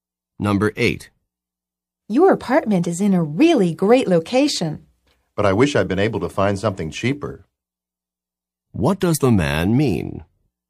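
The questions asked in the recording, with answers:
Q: What does the man mean?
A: He couldn't find anything cheaper.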